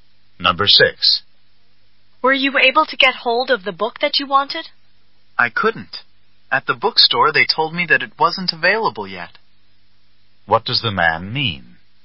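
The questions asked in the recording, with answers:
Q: What does the man mean?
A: He couldn't get the book; it isn't available yet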